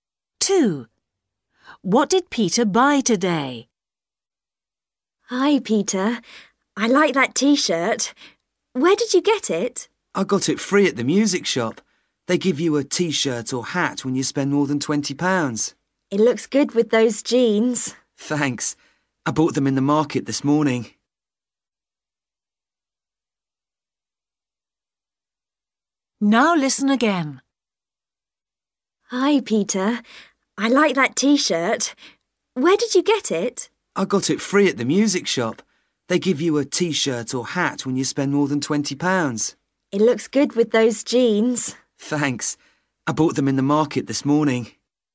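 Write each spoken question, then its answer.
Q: What did Peter buy today?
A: Jeans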